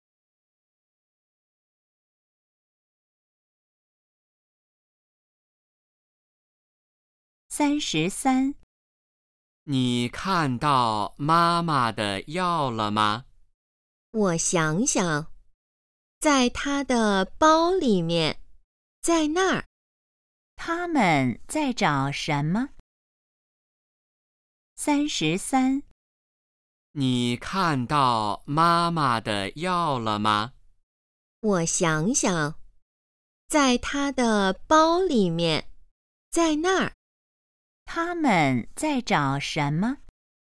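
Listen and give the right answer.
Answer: 妈妈的药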